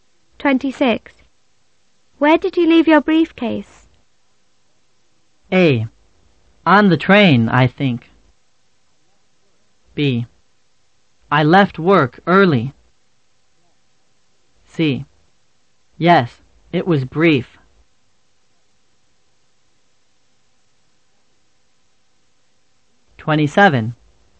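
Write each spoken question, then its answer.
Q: Where did you leave your briefcase?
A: A: On the train, I think.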